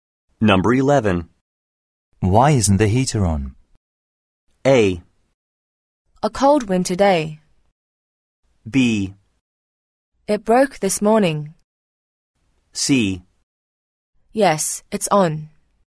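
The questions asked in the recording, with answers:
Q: Why isn't the heater on?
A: B: It broke this morning.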